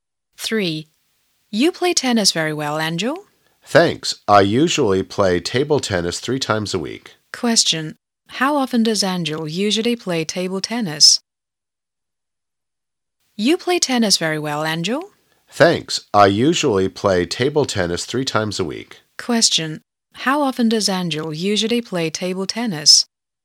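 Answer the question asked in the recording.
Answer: Three times a week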